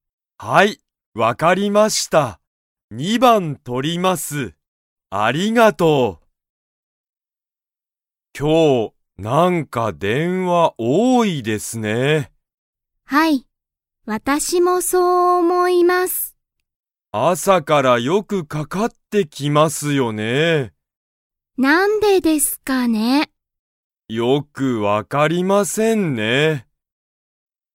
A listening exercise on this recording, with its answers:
Comprehension Quiz (Skip if you don't understand the conversation yet)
今日(きょう)は電話(でんわ)が多(おお)いですか?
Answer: はい